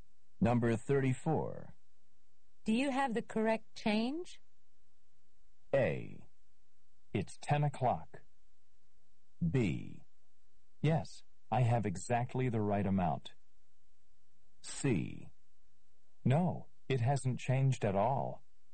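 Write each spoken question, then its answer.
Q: Do you have the correct change?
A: B: Yes, I have exactly the right amount.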